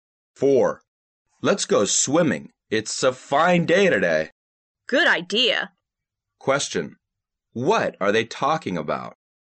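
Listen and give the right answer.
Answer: Going swimming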